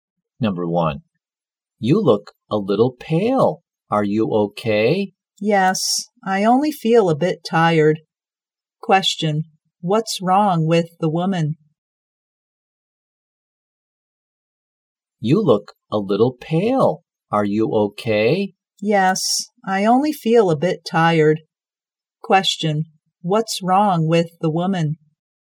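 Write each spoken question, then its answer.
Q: what's wrong with the woman?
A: She feels a bit tired.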